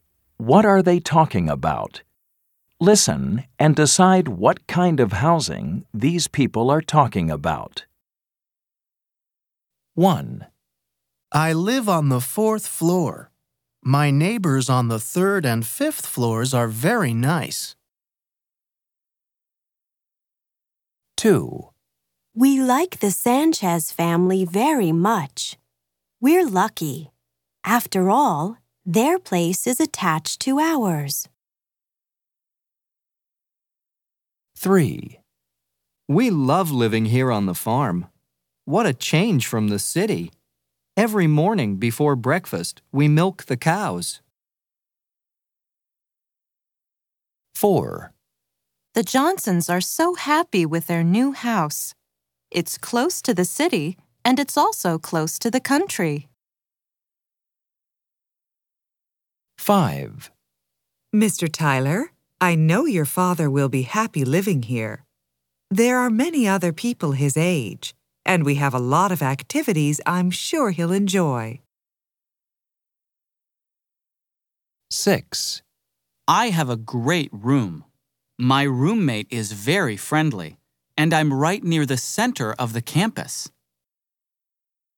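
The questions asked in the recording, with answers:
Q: What are they talking about?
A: an apartment building

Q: What are they talking about?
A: a farmhouse

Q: What are they talking about?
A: a dormitory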